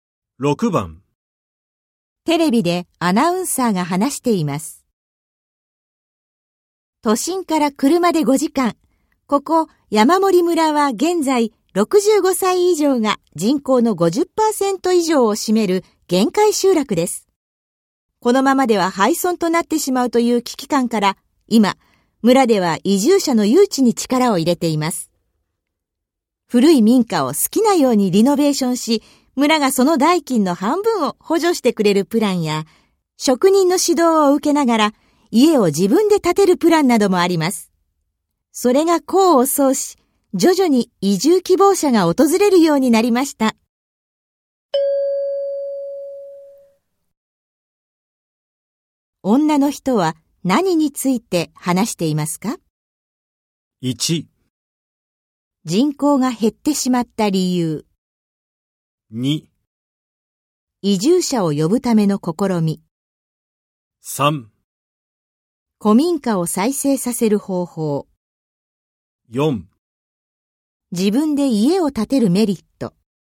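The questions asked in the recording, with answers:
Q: 女の人は何について話していますか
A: 2: 移住者を呼ぶための試み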